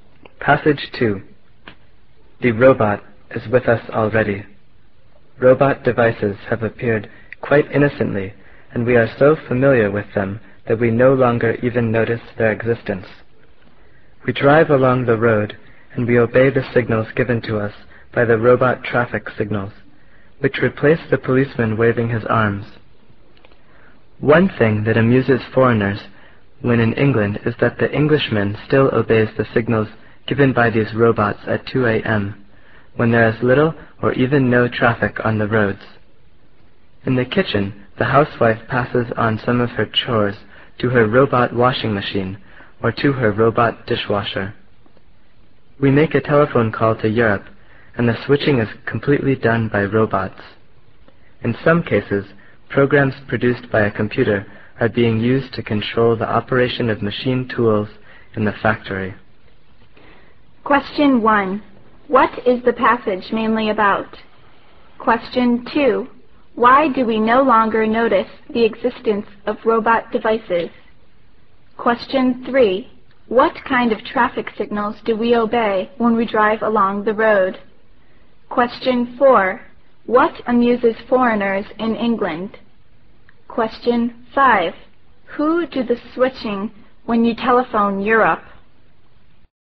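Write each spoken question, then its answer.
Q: What is the passage mainly about?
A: Robots are already part of everyday life

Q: Why do we no longer notice the existence of robot devices?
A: Because we are so familiar with them

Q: What kind of traffic signals do we obey when we drive along the road?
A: Robot traffic signals

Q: What amuses foreigners in England?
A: The English still obey traffic signals at 2 a.m. when there is little or no traffic

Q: Who do the switching when you telephone Europe?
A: Robots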